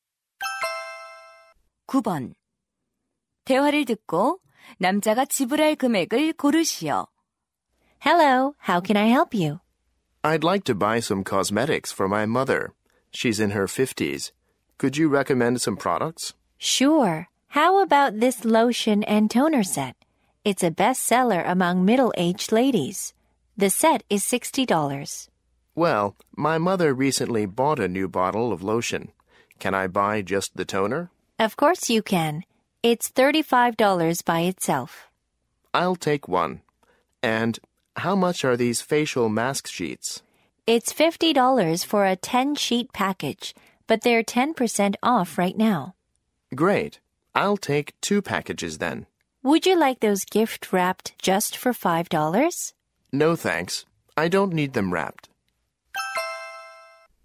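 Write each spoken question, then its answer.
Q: 대화를 듣고 남자가 지불할 금액을 고르시오.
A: $125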